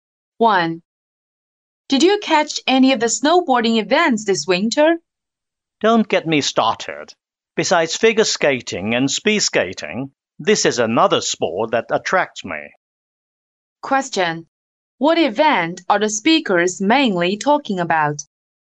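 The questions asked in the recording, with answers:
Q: What event are the speakers mainly talking about?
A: Snowboarding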